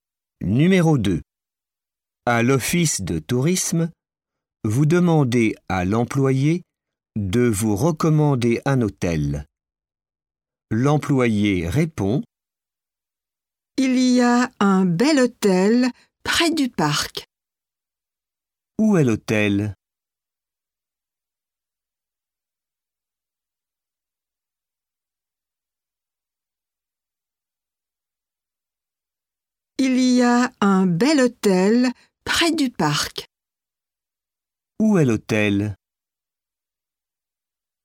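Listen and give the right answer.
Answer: Près du parc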